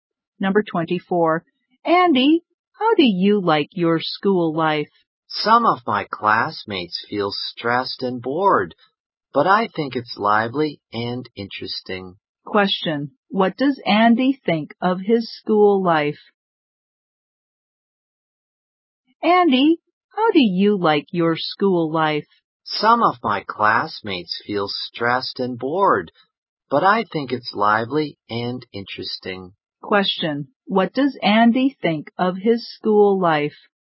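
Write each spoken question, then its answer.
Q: What does Andy think of his school life?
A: Lively and interesting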